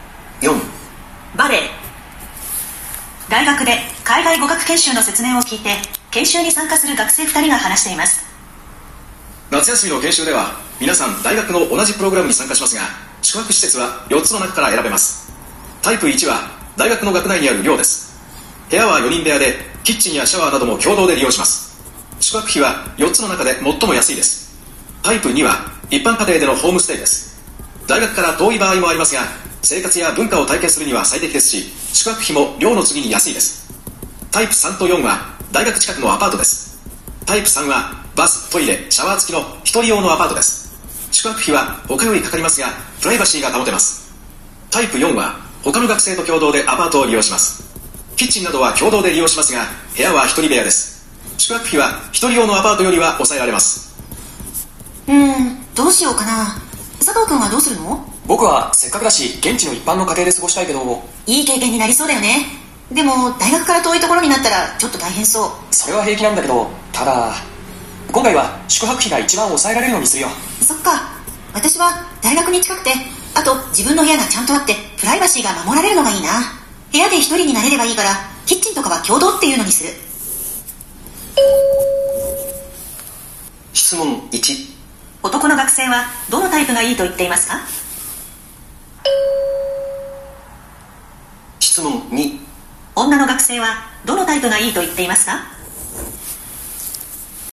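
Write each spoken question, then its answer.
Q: 男の学生はどのタイプがいいと言っていますか?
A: タイプ1(大学の寮)

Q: 女の学生はどのタイプがいいと言っていますか?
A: タイプ4(共同アパートの一人部屋)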